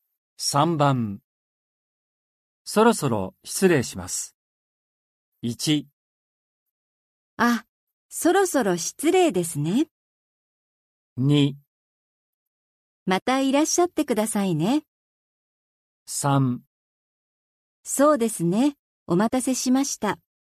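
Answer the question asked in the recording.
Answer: 2: またいらっしゃってくださいね。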